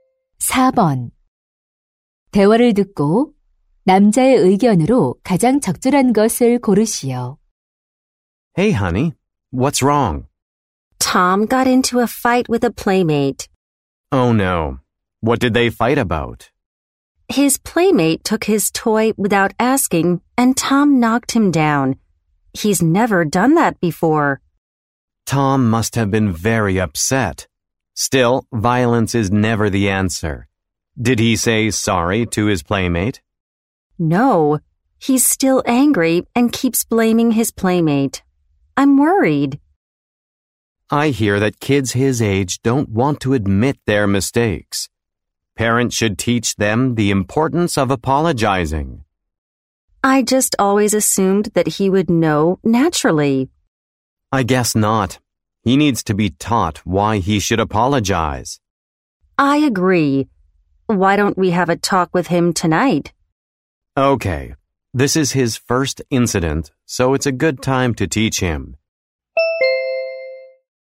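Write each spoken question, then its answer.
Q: 대화를 듣고 남자의 의견으로 가장 적절한 것을 고르시오.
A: 부모는 아이에게 사과의 중요성을 가르쳐야 한다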